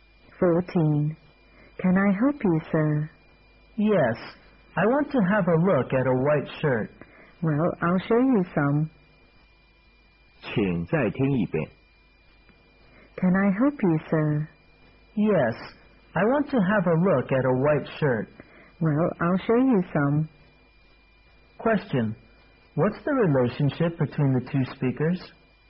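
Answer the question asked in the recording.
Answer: Shop assistant and customer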